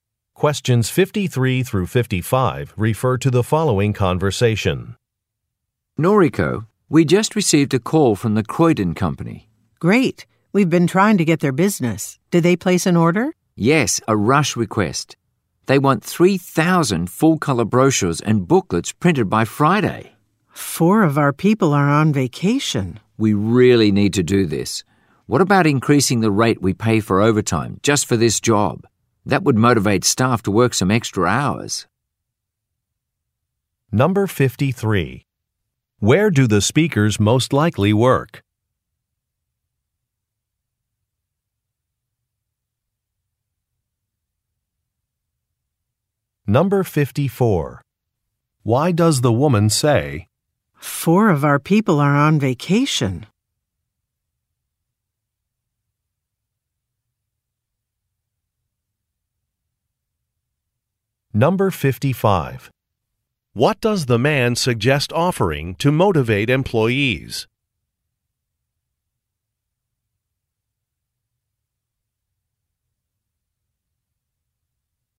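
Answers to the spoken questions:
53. At a printing company
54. She is worried they don't have enough staff to finish the rush order by Friday
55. A higher overtime pay rate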